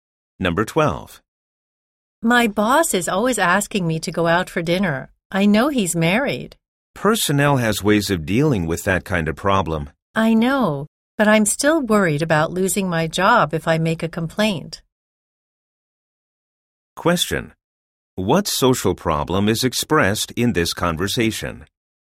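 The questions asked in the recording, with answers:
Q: What social problem is expressed in this conversation?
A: Sexual harassment at work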